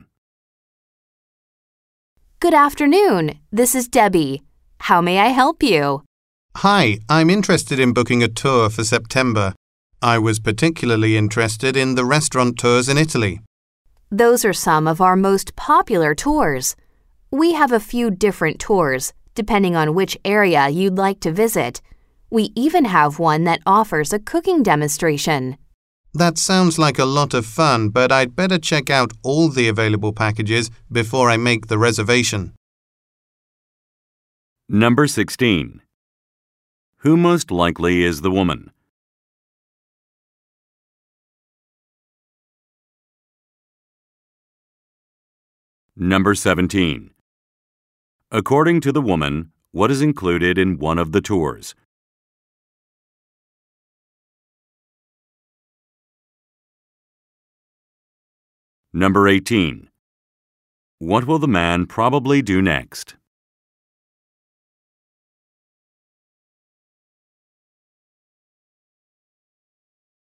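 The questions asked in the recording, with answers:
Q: Who most likely is the woman?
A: A travel agent

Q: According to the woman, what is included in one of the tours?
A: A cooking demonstration

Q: What will the man probably do next?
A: Check out all the available tour packages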